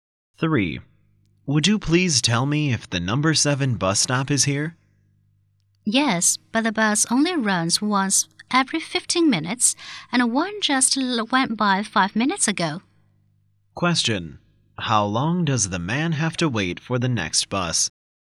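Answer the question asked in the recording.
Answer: 10 minutes.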